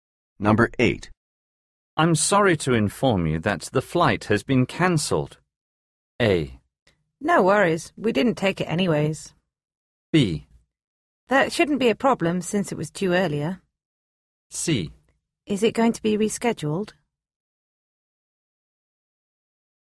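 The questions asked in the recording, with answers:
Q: I'm sorry to inform you that the flight has been cancelled.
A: C: Is it going to be rescheduled?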